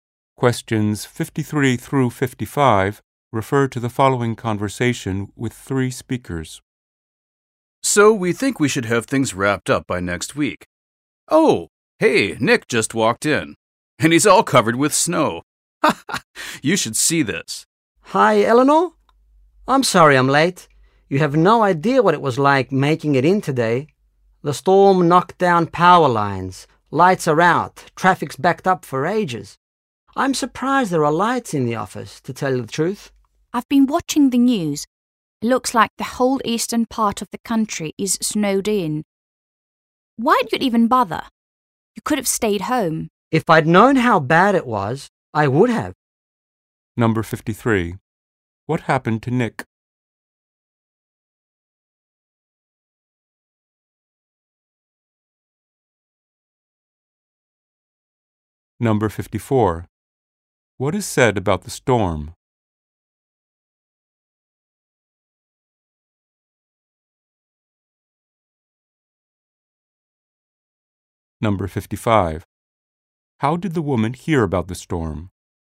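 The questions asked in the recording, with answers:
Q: What happened to Nick?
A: He got caught in the snowstorm and arrived late

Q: What is said about the storm?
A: It knocked down power lines

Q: How did the woman hear about the storm?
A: From the news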